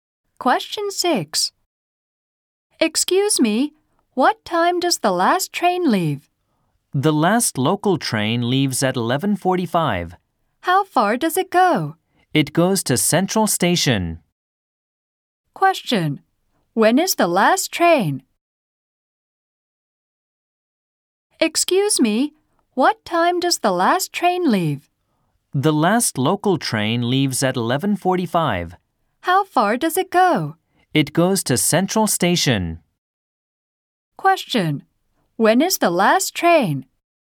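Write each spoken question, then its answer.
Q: When is the last train?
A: At 11:45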